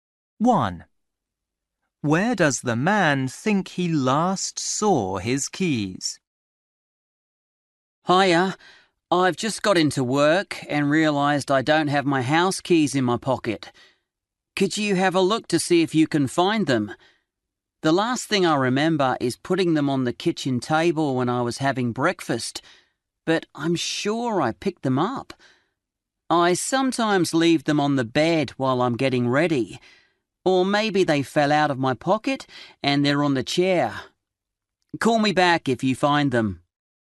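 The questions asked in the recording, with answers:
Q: Where does the man think he last saw his keys?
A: On the kitchen table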